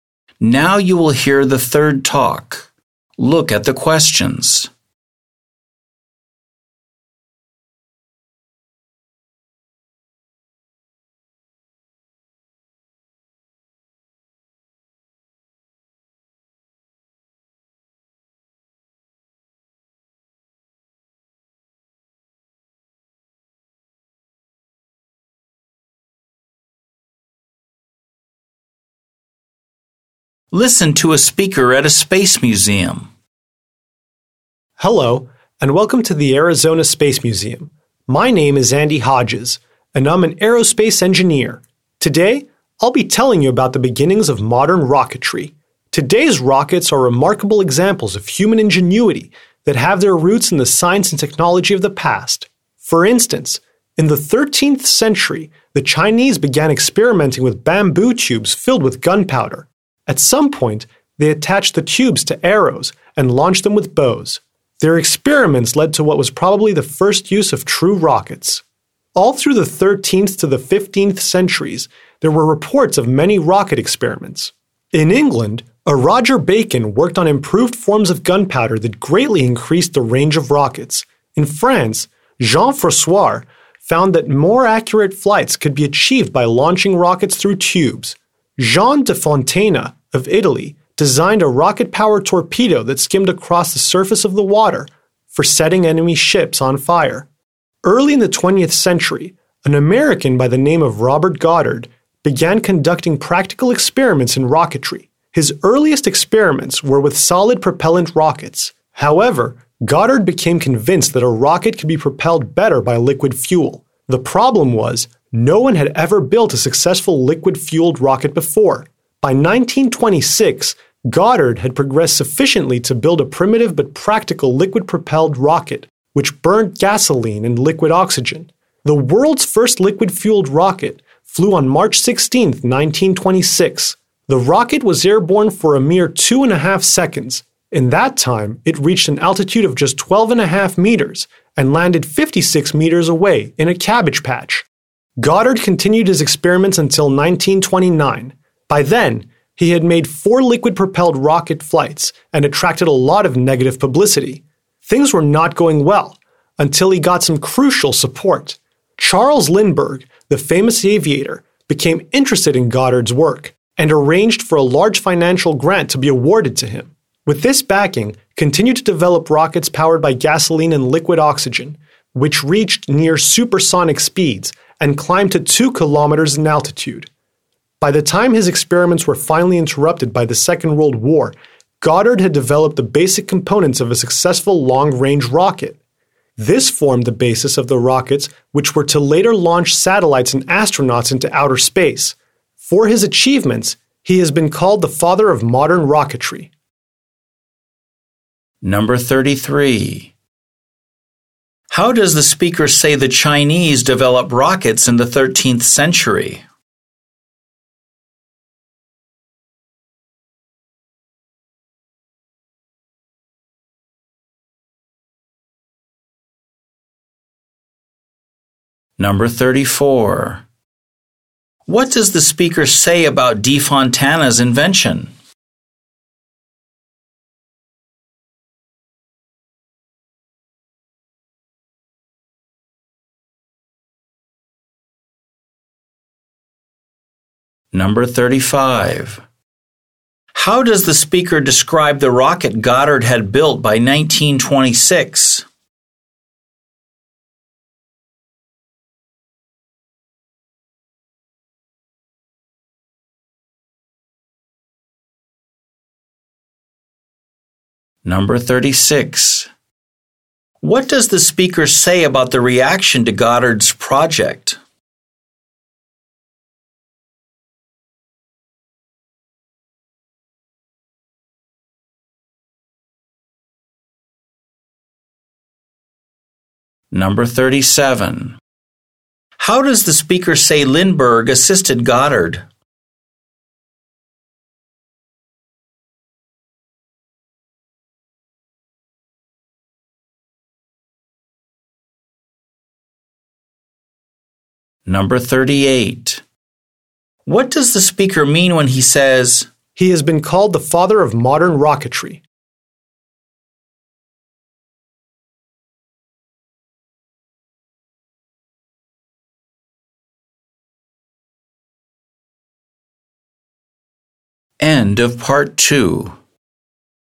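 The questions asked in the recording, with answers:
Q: How does the speaker say the Chinese develop rockets in the 13th century?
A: By attaching bamboo tubes filled with gunpowder to arrows launched with bows

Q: What does the speaker say about De Fontana's invention?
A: It was a rocket-powered torpedo that skimmed across the water to set enemy ships on fire

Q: How does the speaker describe the rocket Goddard had built by 1926?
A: Primitive but practical, burning gasoline and liquid oxygen

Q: What does the speaker say about the reaction to Goddard's project?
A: It attracted a lot of negative publicity

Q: How does the speaker say Lindbergh assisted Goddard?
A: He arranged a large financial grant for him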